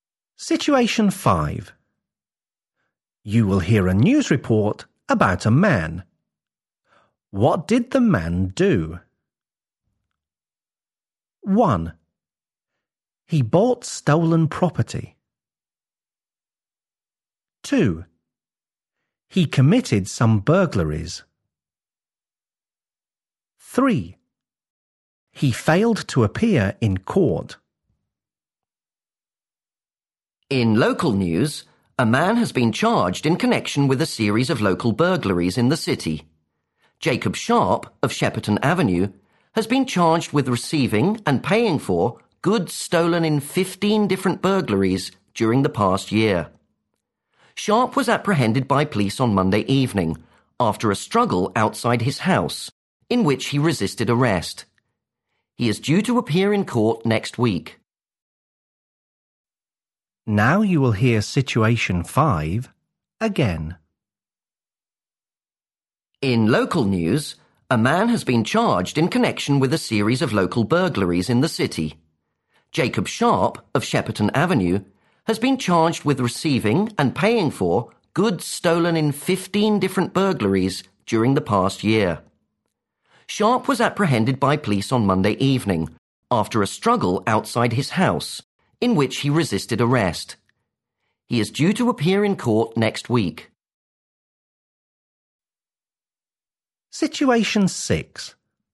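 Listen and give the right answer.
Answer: 1: He bought stolen property.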